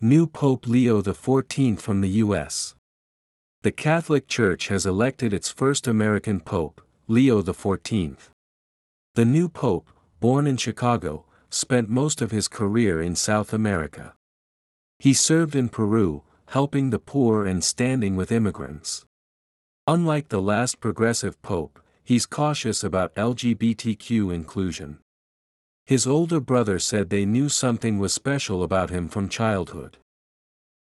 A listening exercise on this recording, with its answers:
次の各質問の答えを探しながら聞きましょう。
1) Where did the new pope spend his career?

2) What kind of people did he support in Peru?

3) What did his brother say about the new pope?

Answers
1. He spent most of his career in South America.
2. He helped the poor and supported immigrants.
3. He said they knew something was special about him from childhood.

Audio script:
New Pope Leo XIV from the U.S.
The Catholic Church has elected its first American pope, Leo the Fourteenth.
The new pope, born in Chicago, spent most of his career in South America.
He served in Peru, helping the poor and standing with immigrants.
Unlike the last progressive pope, he's cautious about LGBTQ inclusion.
His older brother said they knew something was special about him from childhood.